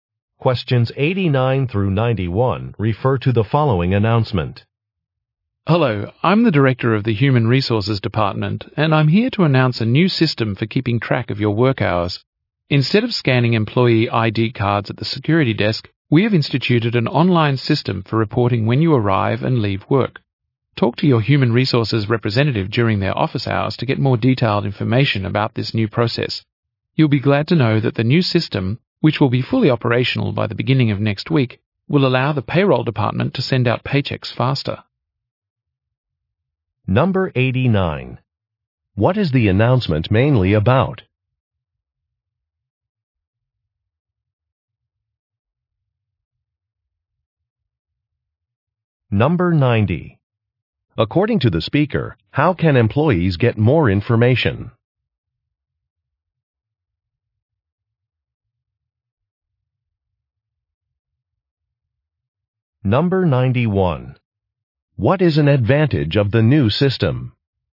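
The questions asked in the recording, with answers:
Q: What is the announcement mainly about?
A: A new online system for tracking work hours

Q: According to the speaker, how can employees get more information?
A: By talking to their Human Resources representative during office hours

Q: What is an advantage of the new system?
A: Paychecks will be sent out faster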